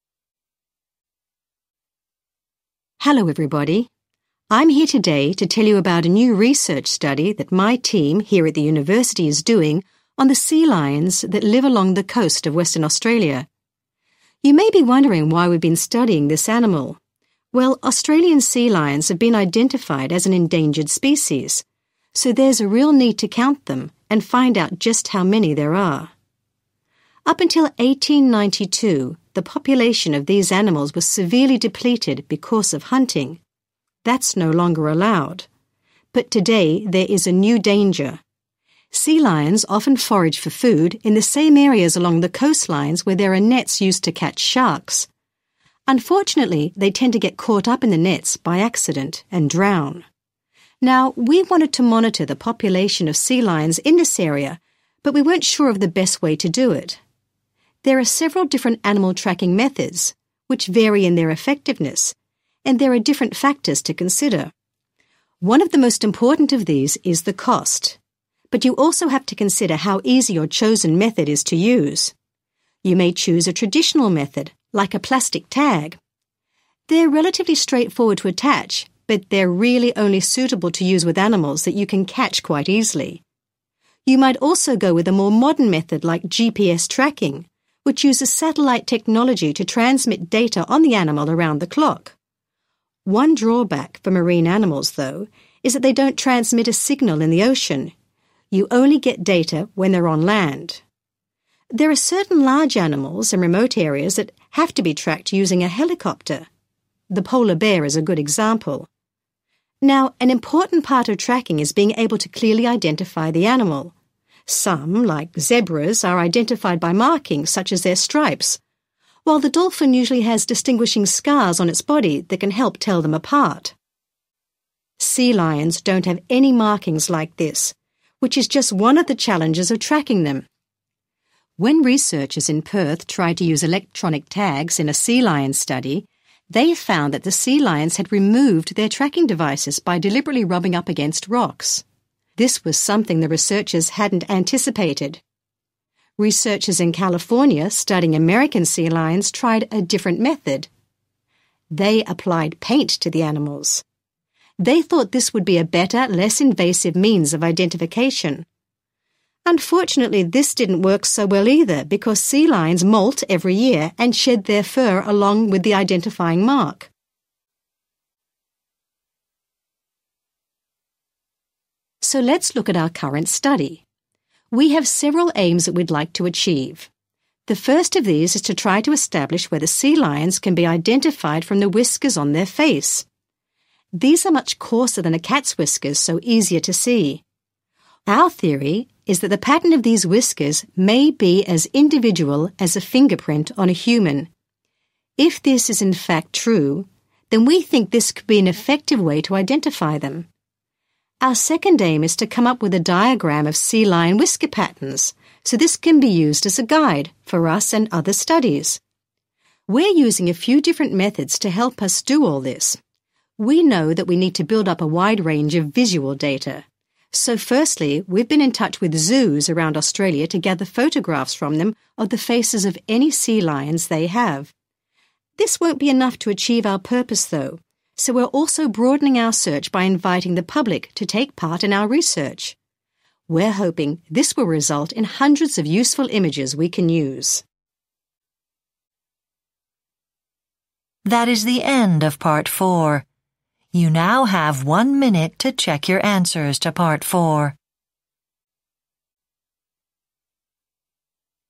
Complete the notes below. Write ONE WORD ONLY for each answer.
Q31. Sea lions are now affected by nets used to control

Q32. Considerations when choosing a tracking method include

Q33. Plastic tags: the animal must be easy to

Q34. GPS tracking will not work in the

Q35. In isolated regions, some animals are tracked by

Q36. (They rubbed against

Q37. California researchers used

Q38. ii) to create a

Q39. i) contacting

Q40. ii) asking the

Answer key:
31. sharks
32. cost
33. catch
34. ocean
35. helicopter
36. rocks
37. paint
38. diagram
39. zoos
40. public